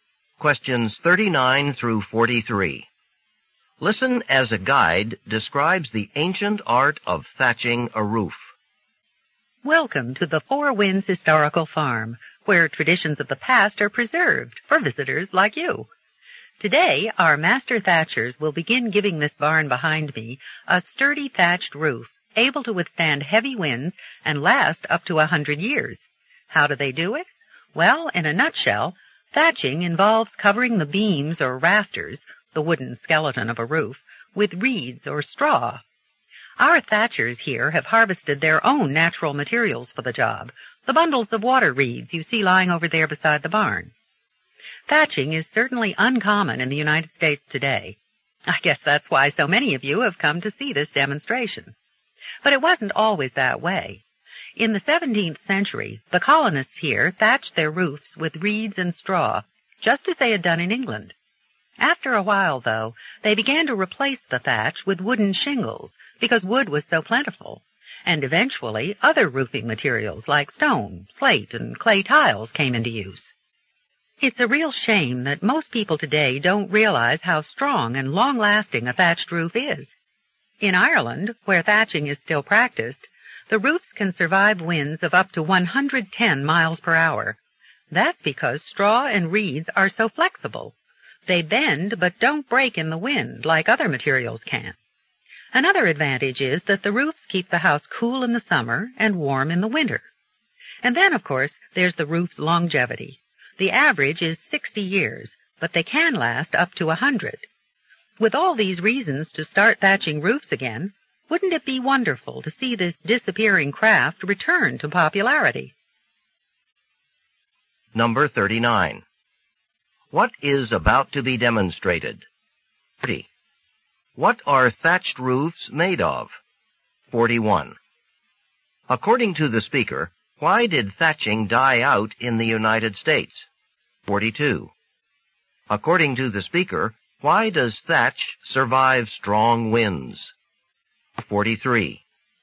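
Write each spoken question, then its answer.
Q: What is about to be demonstrated?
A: Thatching a roof

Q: What are thatched roofs made of?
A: Reeds or straw

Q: According to the speaker, why did thatching die out in the United States?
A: Wood was plentiful, so people used wooden shingles and other materials instead

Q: According to the speaker, why does thatch survive strong winds?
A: Straw and reeds are flexible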